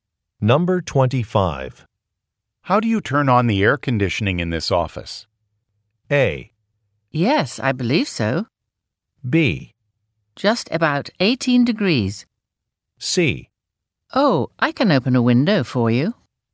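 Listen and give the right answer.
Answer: C: Oh, I can open a window for you.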